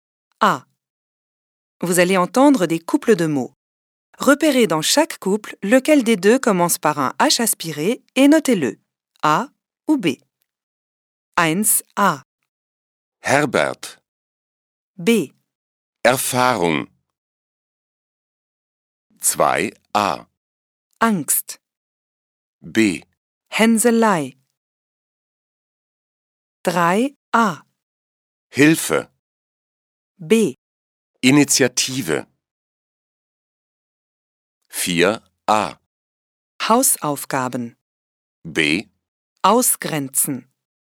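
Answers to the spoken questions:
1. A: Herbert
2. B: Hänselei
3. A: Hilfe
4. A: Hausaufgaben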